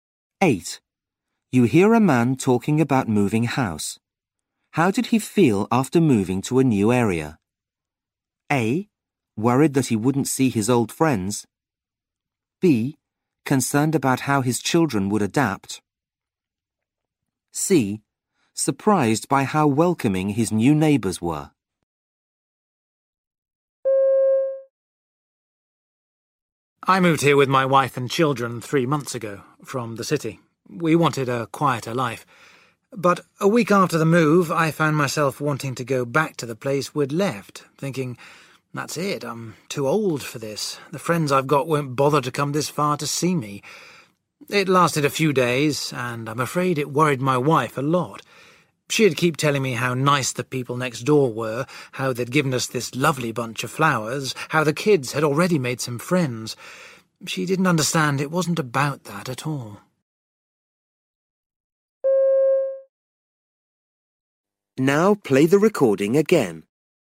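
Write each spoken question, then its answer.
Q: How did he feel after moving to a new area?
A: A: Worried that he wouldn't see his old friends.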